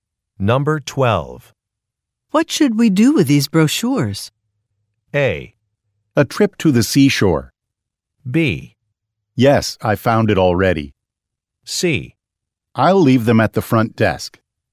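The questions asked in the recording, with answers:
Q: What should we do with these brochures?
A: C: I'll leave them at the front desk.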